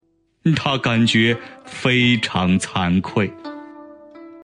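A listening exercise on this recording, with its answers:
★音声を聞き、空欄〇に当てはまる単語を探して、授業内課題用紙に漢字とピンインを書いてください。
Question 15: 它感觉〇〇惭愧。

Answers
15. 非常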